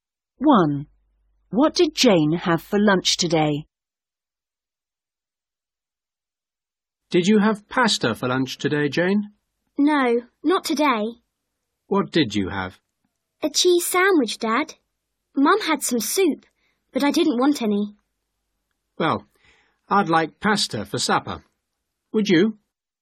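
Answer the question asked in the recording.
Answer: A cheese sandwich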